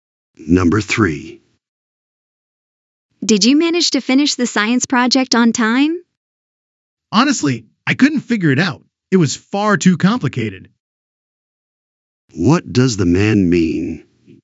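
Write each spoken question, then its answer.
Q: What does the man mean?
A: He didn't finish the project because it was too complicated.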